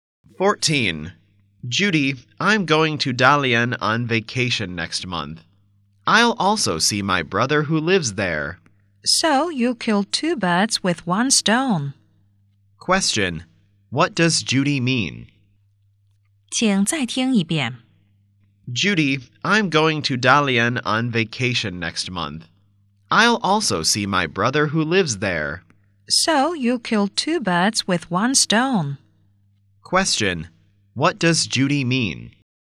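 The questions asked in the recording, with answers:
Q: What does Judy mean?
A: The man can do two things on one trip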